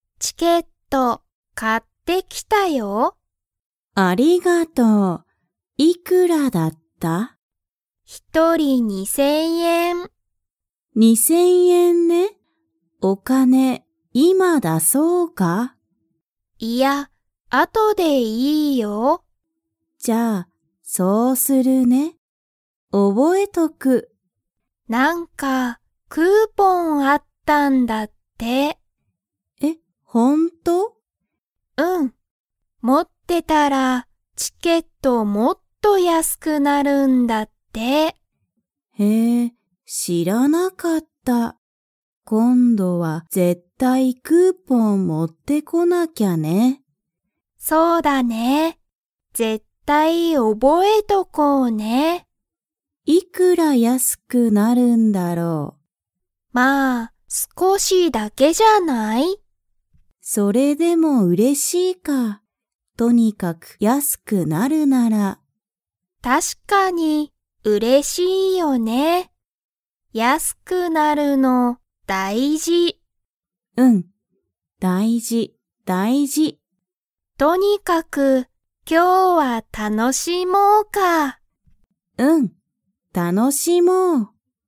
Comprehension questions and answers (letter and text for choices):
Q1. ジュンは、今(いま)お金(かね)を出(だ)しますか?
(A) はい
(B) いいえ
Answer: (B) いいえ

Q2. クーポンを持(も)ってたら、チケットがもっと____なる。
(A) 楽(たの)しく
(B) 安(やす)く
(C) かわいく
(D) 高(たか)く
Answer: (B) 安(やす)く

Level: Level 2